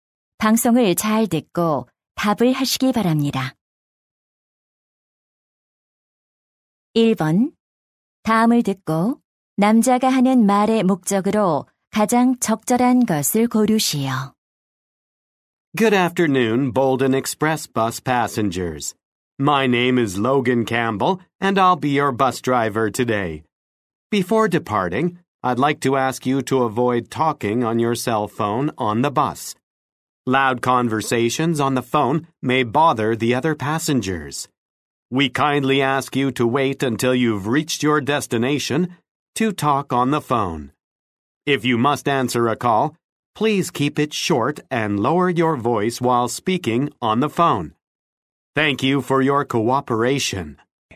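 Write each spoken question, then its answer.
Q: 다음을 듣고 남자가 하는 말의 목적으로 가장 적절한 것을 고르시오.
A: 버스 안에서 휴대전화 통화를 자제해 달라고 요청하려고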